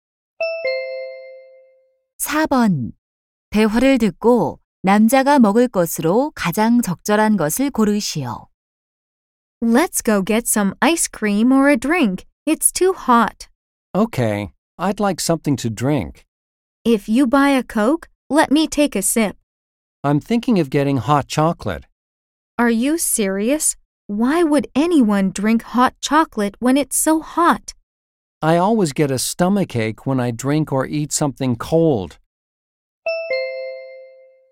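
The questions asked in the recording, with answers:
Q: 대화를 듣고 남자가 먹을 것으로 가장 적절한 것을 고르시오.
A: 핫초코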